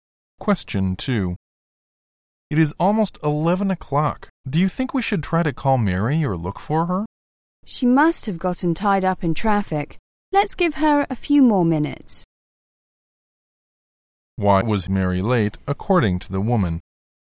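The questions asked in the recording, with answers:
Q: Why was Mary late, according to the woman?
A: She was probably stuck in traffic.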